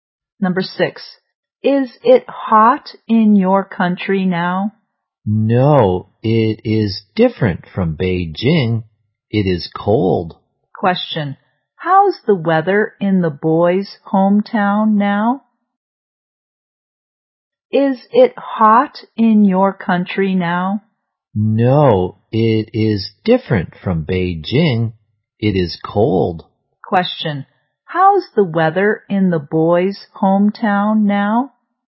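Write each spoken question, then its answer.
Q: how's the weather in the boy's hometown now?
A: Cold.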